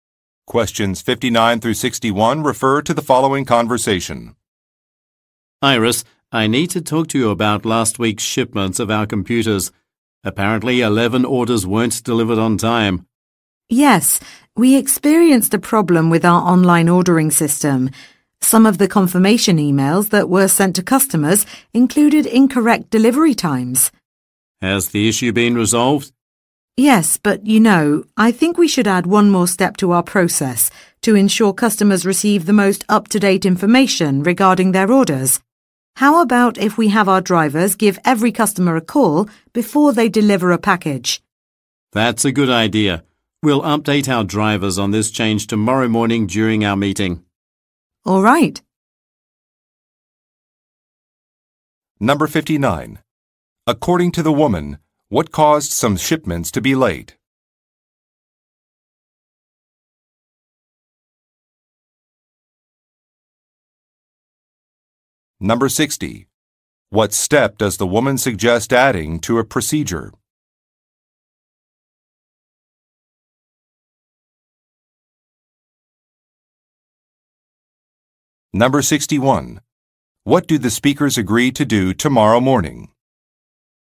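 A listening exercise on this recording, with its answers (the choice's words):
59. According to the woman, what caused some shipments to be late?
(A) Some workers were not available.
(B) Some documents could not be located.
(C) There was an issue with an online system.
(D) A delivery van experienced engine trouble.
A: There was an issue with an online system.

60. What step does the woman suggest adding to a procedure?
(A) Distributing a survey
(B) Making phone calls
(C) Reviewing an inventory list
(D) Performing daily inspections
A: Making phone calls

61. What do the speakers agree to do tomorrow morning?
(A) Contact some job candidates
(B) Visit a new facility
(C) Provide an update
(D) Book some plane tickets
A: Provide an update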